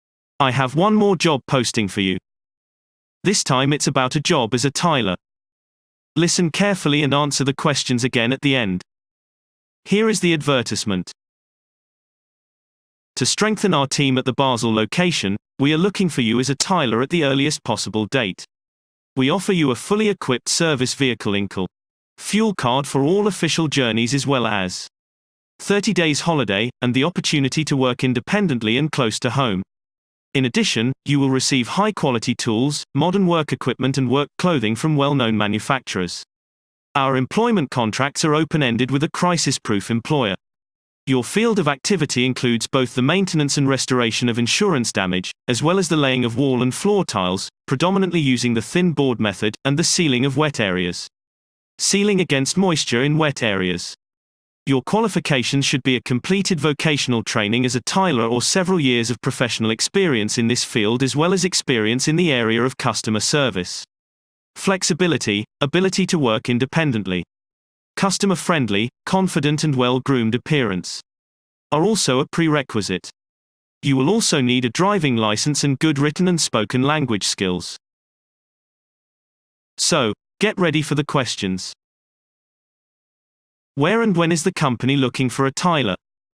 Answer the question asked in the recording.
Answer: Response. The company is looking for a tiler at the Basel location with immediate effect.